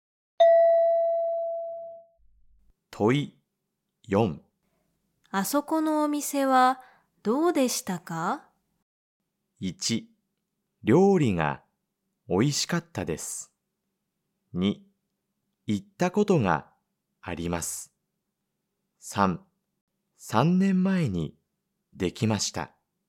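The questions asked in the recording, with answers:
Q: あそこのお店はどうでしたか?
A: 1: 料理が美味しかったです。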